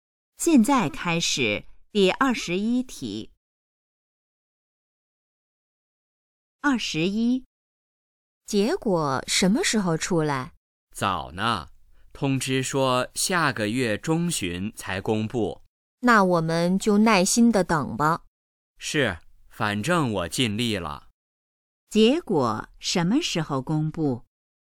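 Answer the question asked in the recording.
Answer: 下个月中旬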